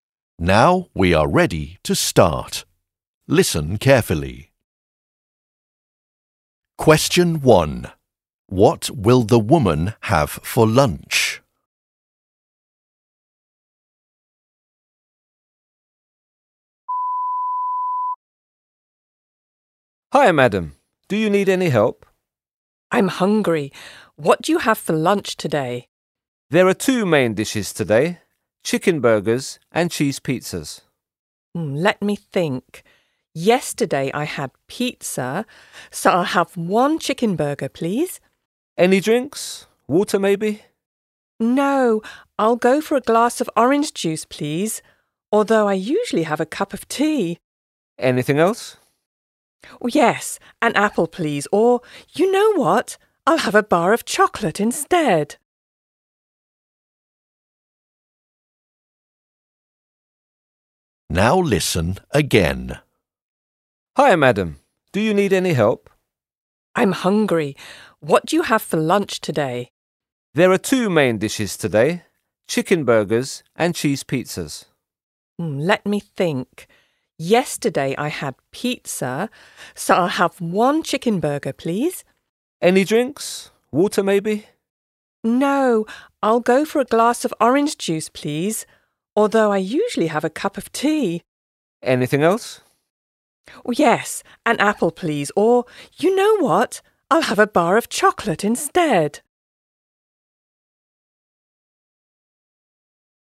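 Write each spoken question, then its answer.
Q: What will the woman have for lunch?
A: A chicken burger, a glass of orange juice and a bar of chocolate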